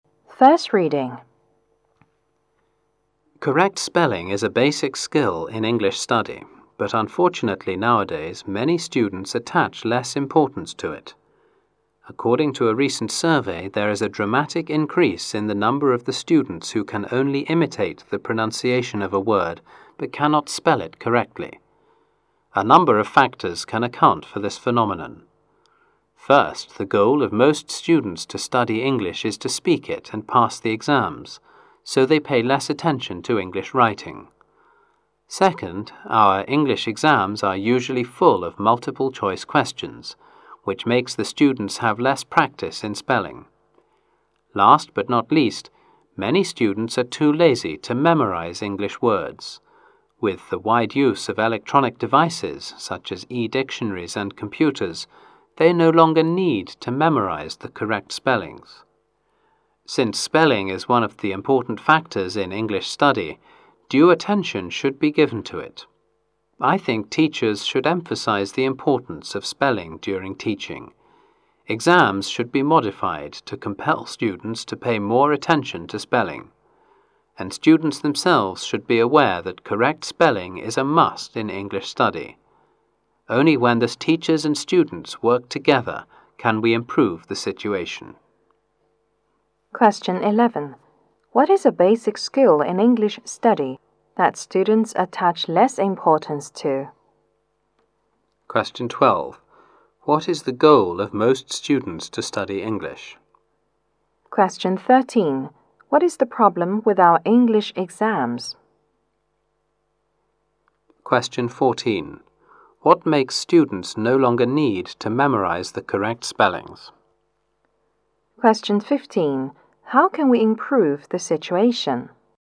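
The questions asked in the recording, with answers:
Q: What is a basic skill in English study that students attach less importance to?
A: Correct spelling

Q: What is the goal of most students to study English?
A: To speak it and pass exams

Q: What is the problem with our English exams?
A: Full of multiple choice questions

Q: What makes students no longer need to memorize the correct spellings?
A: Electronic devices

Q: How can we improve the situation?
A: Teachers and students work together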